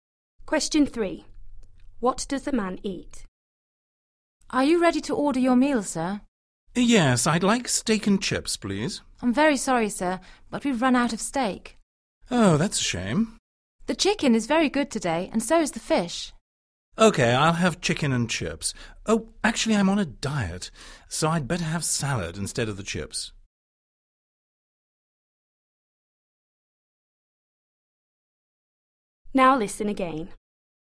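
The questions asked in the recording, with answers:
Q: What does the man eat?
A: Chicken and salad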